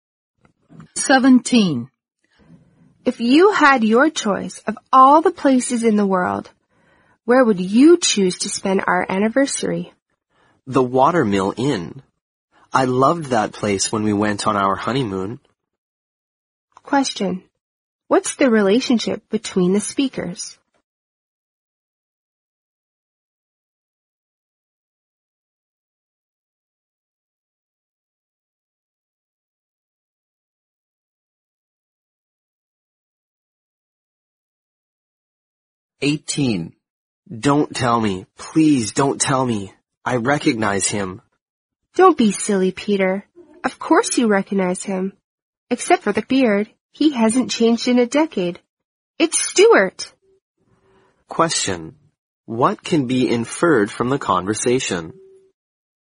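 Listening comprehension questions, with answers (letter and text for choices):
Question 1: 17.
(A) Receptionist and customer.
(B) Attendant and passenger.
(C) Husband and wife.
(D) Guide and tourist.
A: (C) Husband and wife.

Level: 四级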